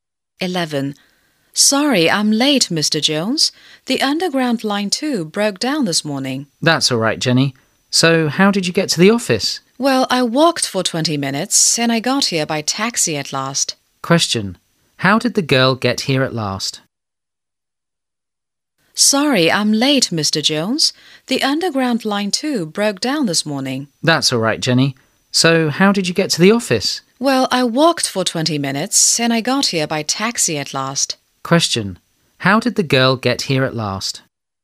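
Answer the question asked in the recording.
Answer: By taxi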